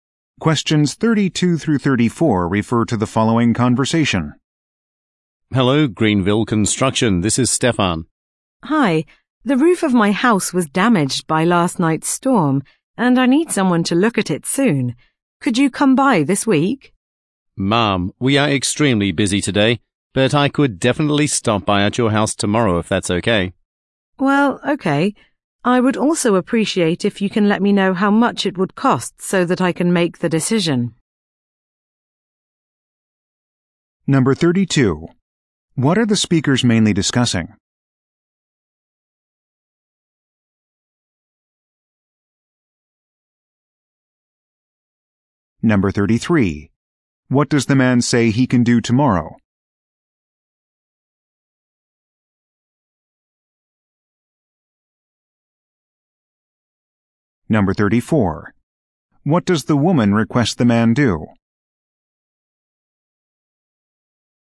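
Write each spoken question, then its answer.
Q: What are the speakers mainly discussing?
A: Roof damage to the woman's house from a storm

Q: What does the man say he can do tomorrow?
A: Stop by her house

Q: What does the woman request the man do?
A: Tell her how much the repair will cost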